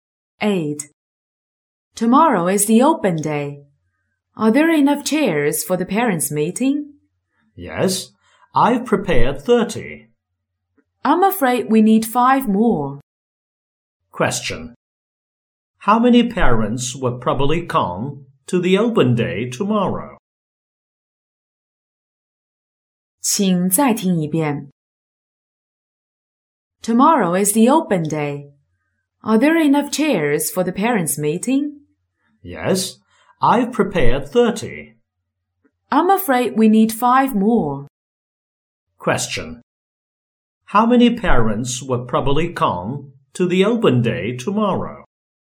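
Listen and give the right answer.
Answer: 35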